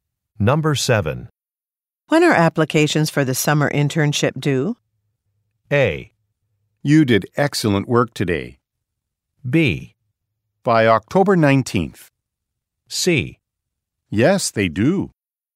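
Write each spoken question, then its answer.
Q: When are applications for the summer internship due?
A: B: By October 19th.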